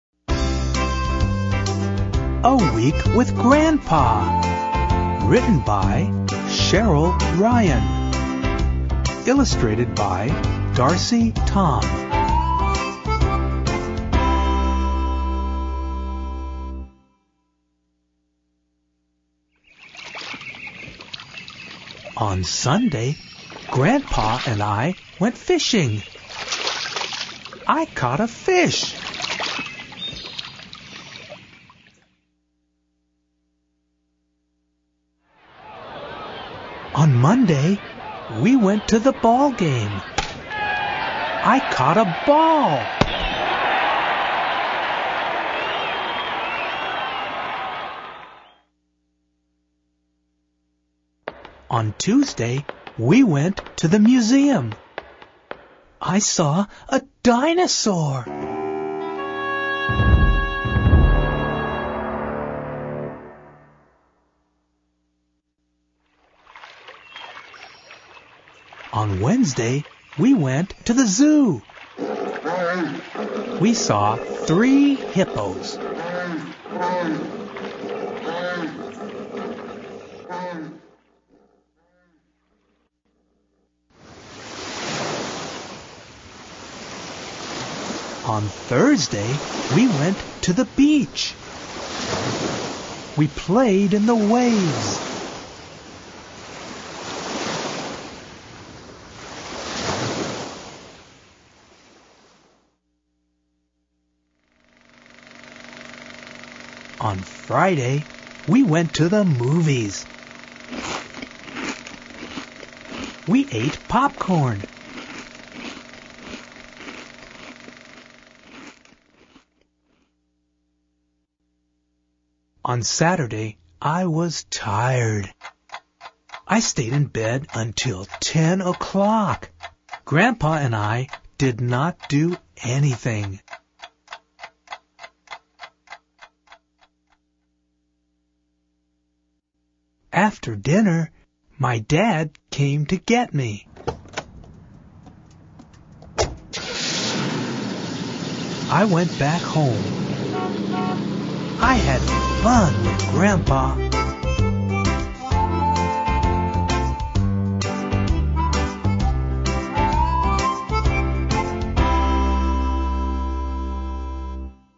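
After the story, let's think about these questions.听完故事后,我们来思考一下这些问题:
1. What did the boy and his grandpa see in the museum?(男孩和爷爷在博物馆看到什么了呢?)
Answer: A dinosaur

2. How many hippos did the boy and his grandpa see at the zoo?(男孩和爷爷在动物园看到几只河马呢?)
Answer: Three

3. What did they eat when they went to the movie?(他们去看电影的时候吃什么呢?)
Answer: Popcorn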